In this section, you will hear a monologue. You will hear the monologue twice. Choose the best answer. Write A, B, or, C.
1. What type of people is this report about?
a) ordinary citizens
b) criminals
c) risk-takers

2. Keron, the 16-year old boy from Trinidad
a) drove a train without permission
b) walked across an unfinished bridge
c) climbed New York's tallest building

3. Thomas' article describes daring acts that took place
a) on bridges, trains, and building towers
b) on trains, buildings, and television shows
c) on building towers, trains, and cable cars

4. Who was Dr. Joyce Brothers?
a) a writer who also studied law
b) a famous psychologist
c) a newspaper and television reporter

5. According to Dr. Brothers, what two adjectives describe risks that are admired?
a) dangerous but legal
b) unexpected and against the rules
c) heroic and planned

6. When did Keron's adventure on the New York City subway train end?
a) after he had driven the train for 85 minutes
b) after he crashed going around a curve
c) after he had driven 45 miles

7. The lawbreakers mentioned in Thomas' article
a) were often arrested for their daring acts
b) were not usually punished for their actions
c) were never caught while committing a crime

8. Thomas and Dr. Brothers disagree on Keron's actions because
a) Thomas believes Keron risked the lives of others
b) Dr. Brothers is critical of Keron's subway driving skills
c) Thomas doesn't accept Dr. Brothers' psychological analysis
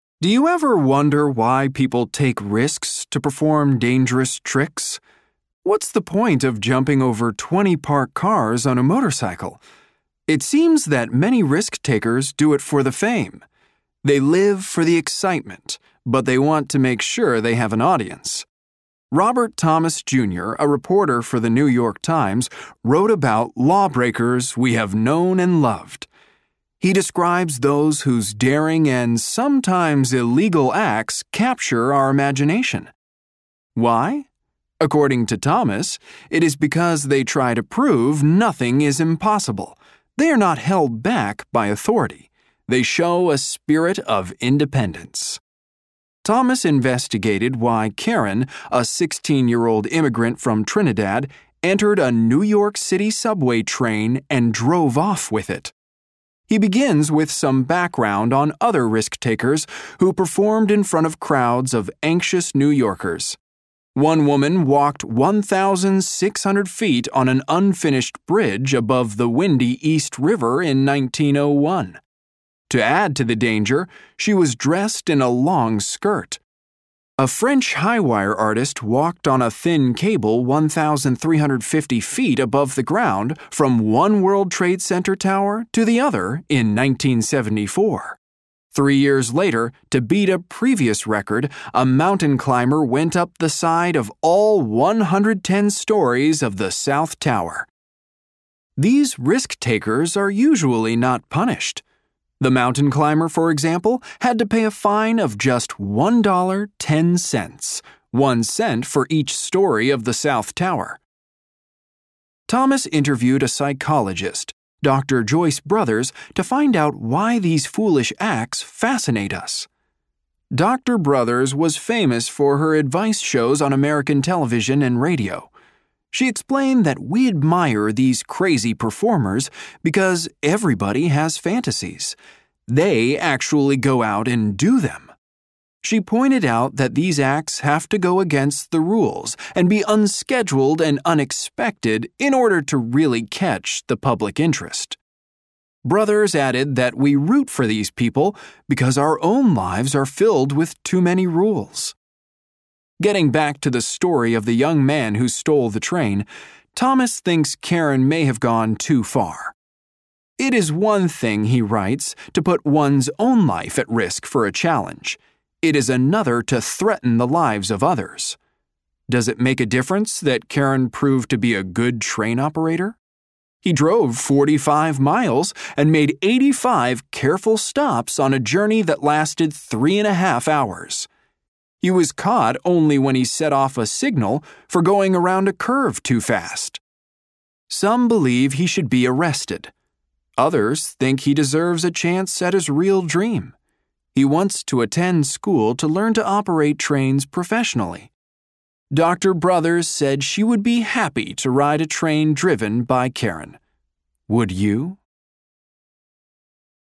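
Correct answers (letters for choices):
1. c
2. a
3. a
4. b
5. b
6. c
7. b
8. a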